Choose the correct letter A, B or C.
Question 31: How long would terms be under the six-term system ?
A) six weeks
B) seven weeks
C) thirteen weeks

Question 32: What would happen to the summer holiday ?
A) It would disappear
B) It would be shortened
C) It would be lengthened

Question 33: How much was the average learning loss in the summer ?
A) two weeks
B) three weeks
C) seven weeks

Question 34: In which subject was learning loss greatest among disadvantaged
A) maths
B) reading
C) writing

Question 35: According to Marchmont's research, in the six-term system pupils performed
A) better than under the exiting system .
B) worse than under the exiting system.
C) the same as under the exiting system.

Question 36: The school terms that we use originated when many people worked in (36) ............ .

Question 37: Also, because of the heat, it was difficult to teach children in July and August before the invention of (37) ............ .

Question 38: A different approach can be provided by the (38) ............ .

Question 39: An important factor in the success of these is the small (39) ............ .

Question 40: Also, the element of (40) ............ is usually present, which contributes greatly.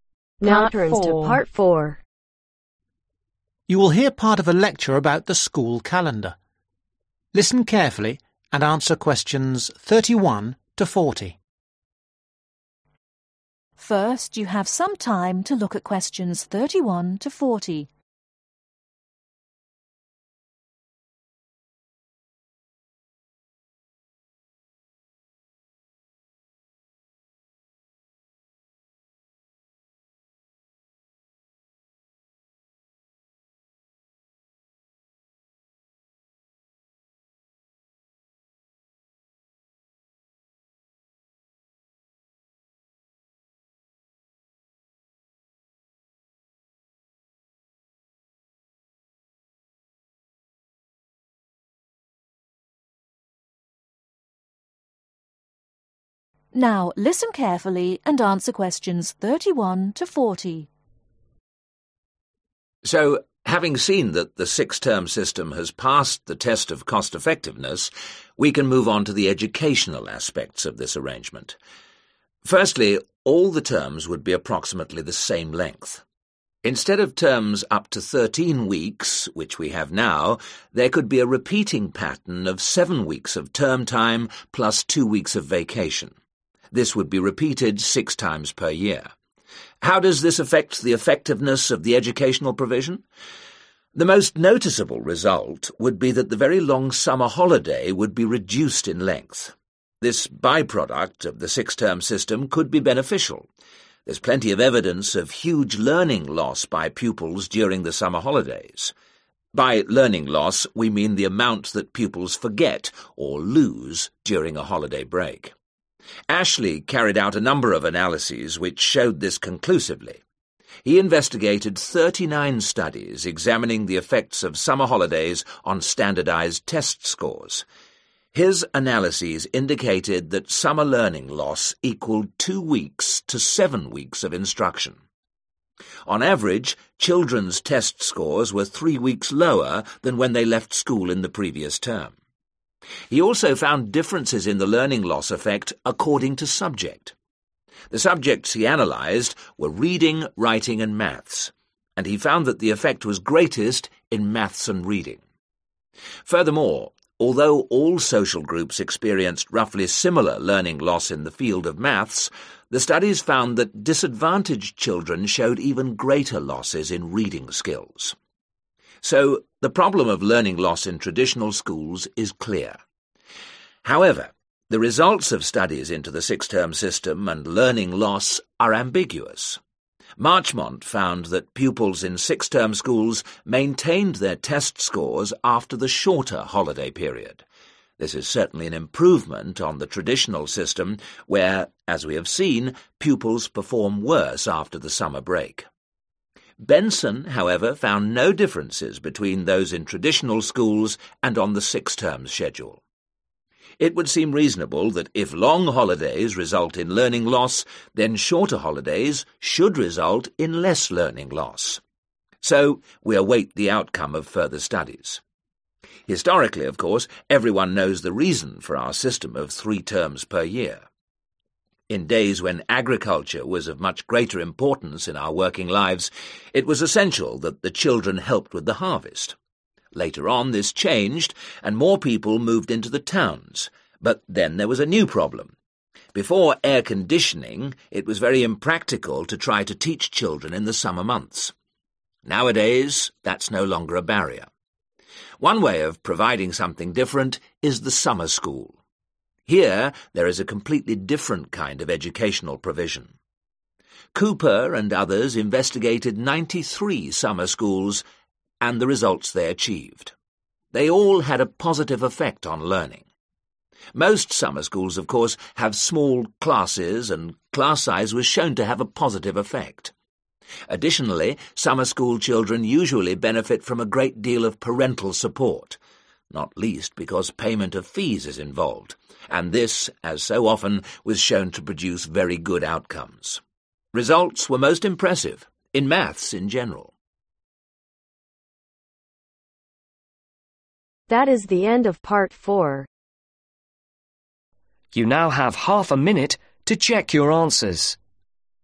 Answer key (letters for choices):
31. B
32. B
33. B
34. B
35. A
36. Agriculture
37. Air conditioning
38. Summer School
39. Class Size
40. Parental Support